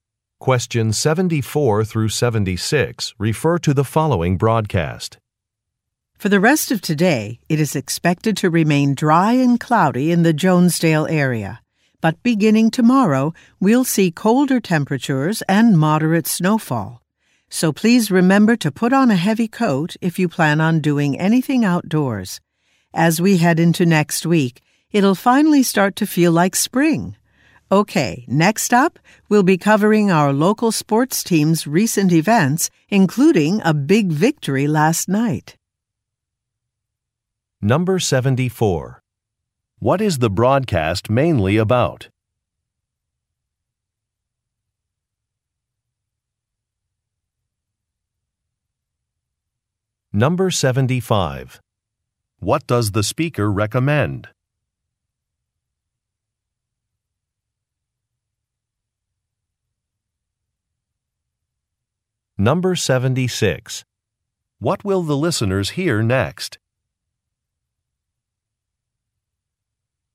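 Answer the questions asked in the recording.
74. The weather
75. Wearing a heavy coat
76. Local sports news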